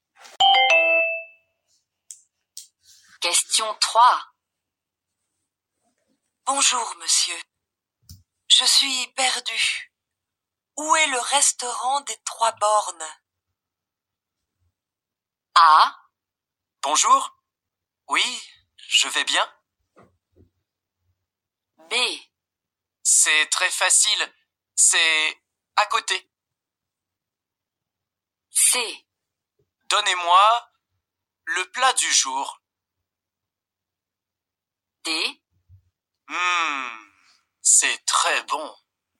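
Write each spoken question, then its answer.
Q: Où est le restaurant des Trois Bornes?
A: B: C'est très facile. C'est à côté.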